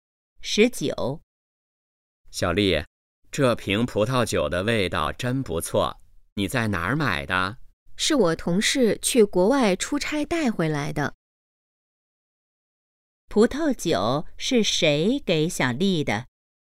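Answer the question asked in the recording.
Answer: 同事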